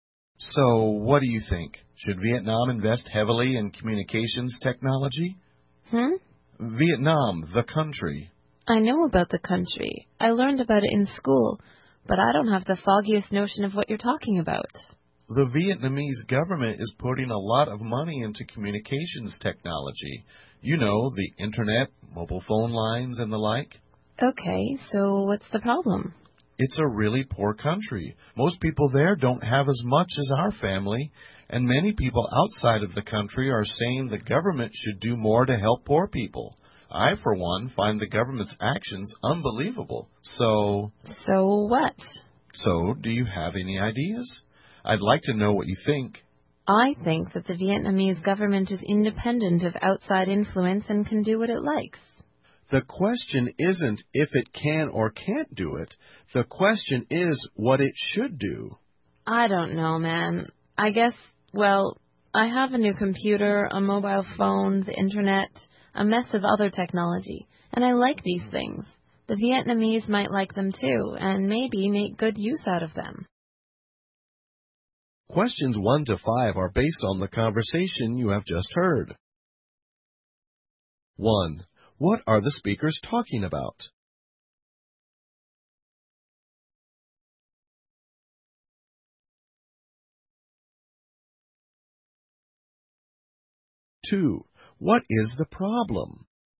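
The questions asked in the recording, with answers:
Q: What are the speakers talking about?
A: Whether Vietnam should invest heavily in communications technology

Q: What is the problem?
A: Vietnam is a poor country, and critics say the government should spend more on helping poor people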